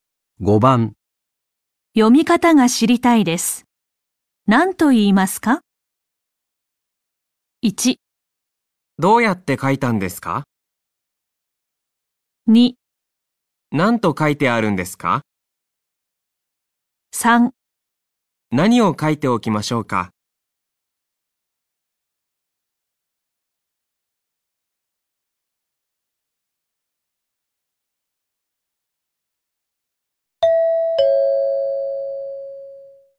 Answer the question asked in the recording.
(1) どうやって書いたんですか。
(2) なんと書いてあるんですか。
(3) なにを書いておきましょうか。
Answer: (2) なんと書いてあるんですか。

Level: N4 Listening · Test 1